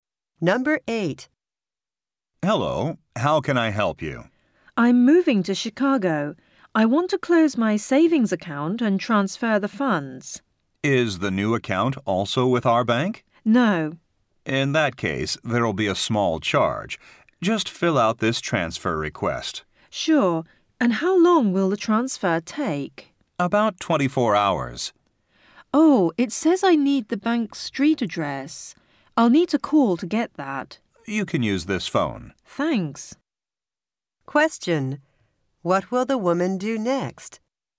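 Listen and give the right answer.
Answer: Call to get the bank's street address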